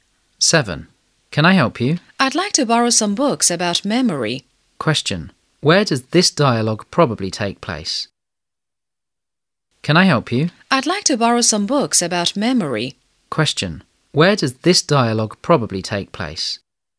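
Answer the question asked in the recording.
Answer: In a library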